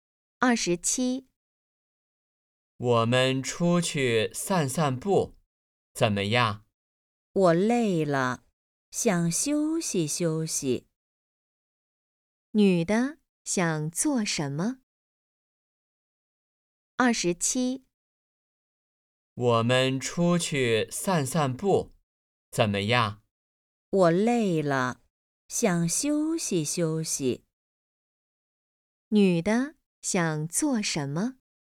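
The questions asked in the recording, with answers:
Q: 女的想做什么?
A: 休息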